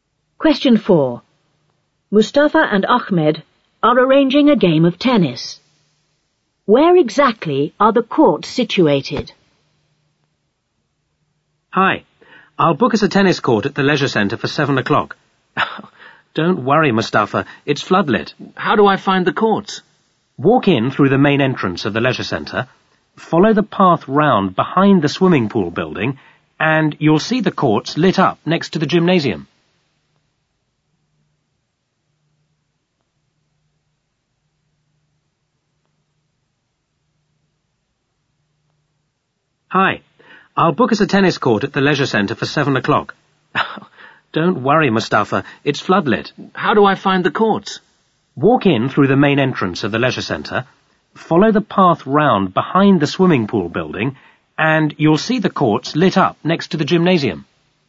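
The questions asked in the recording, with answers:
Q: Where exactly are the courts situated?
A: Behind the swimming pool building, next to the gymnasium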